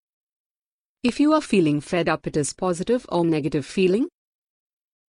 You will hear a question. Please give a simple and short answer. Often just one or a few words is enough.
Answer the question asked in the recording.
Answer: A negative feeling